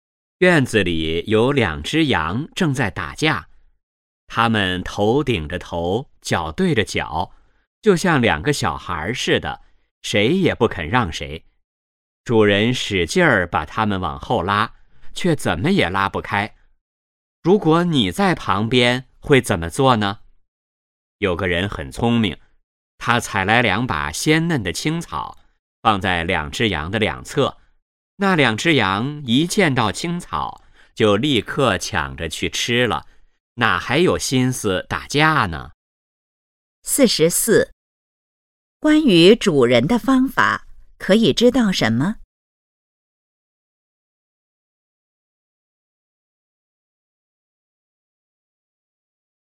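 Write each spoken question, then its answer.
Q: 那两只羊看见青草后是什么反应?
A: 立刻抢着去吃,不打架了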